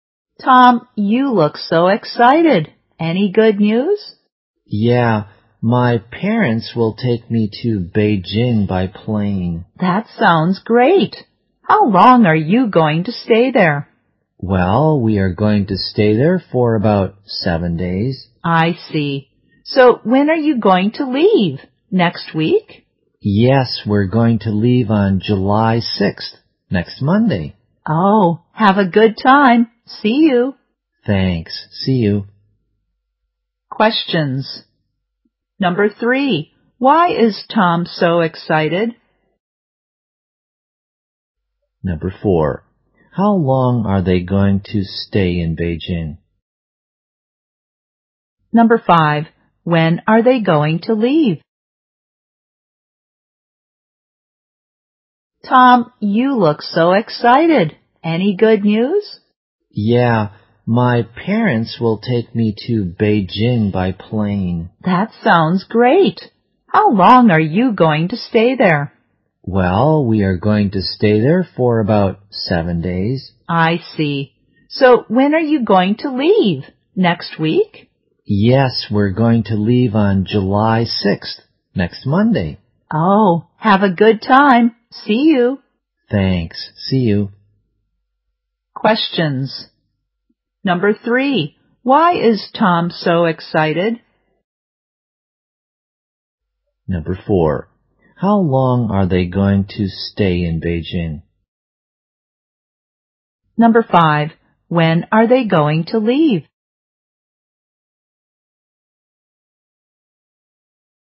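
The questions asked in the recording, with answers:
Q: Why is Tom so excited?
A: His parents will take him to Beijing by plane

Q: How long are they going to stay in Beijing?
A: About 7 days

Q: When are they going to leave?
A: On July 6th, next Monday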